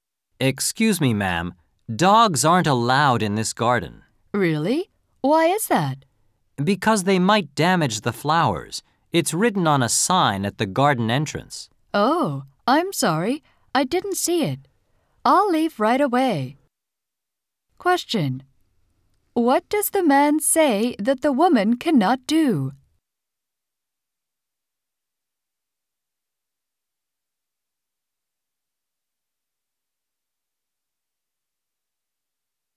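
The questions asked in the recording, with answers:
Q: What does the man say that the woman cannot do?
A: Bring her dog into the garden.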